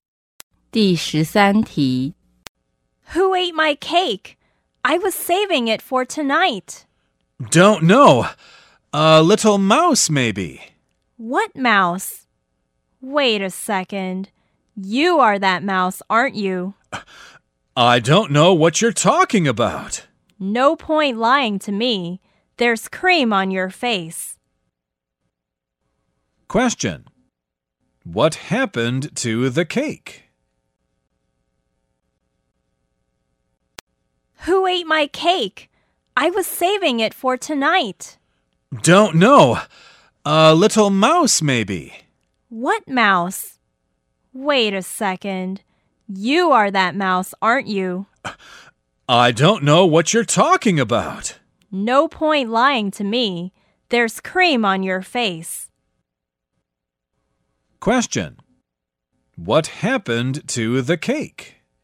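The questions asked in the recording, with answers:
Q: What happened to the cake?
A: The listener ate it and lied about a mouse eating it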